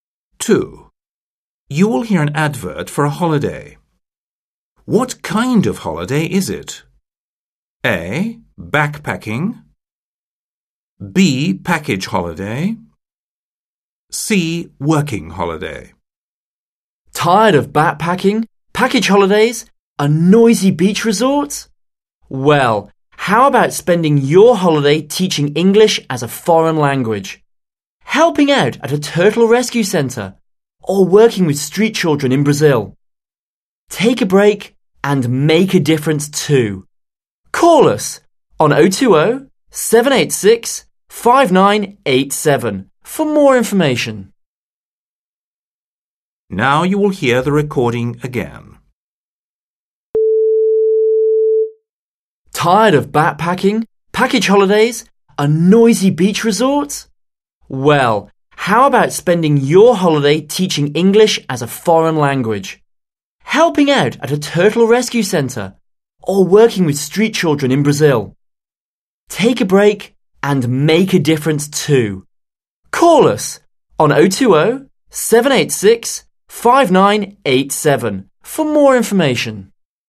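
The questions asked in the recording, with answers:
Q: What kind of holiday is it?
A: C: Working holiday.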